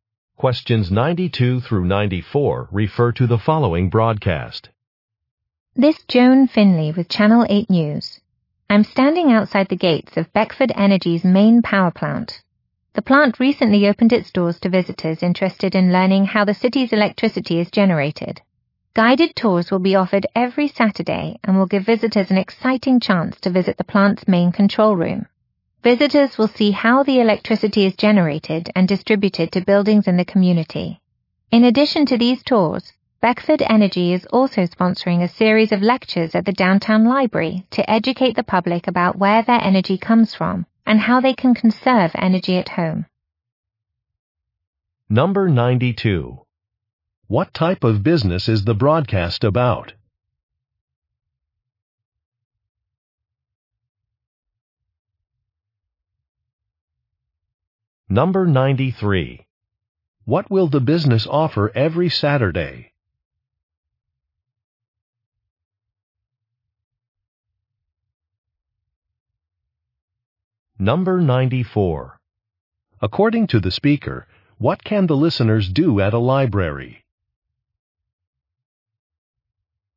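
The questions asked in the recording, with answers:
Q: What type of business is the broadcast about?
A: A power plant / energy company

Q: What will the business offer every Saturday?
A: Guided tours

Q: According to the speaker, what can the listeners do at a library?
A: Attend lectures about energy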